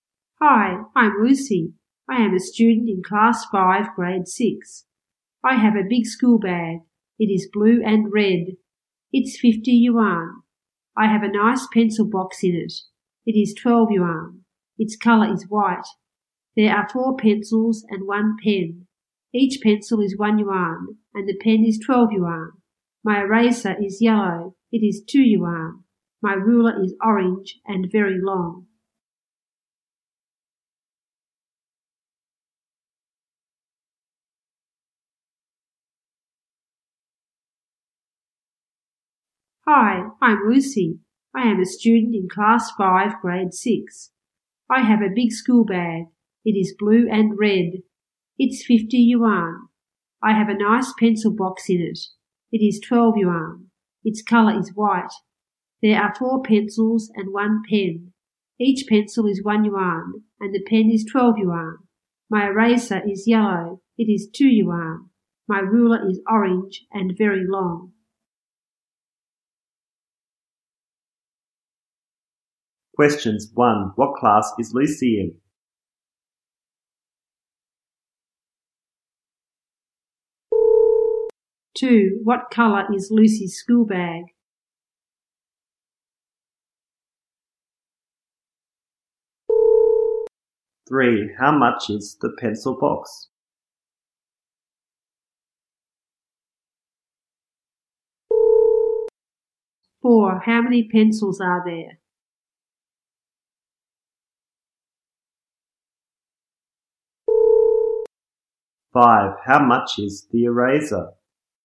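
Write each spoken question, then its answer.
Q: What class is Lucy in?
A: Class 5, Grade 6

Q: What color is Lucy's school bag?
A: Blue and red

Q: How much is the pencil box?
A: 12 yuan

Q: How much is the eraser?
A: 2 yuan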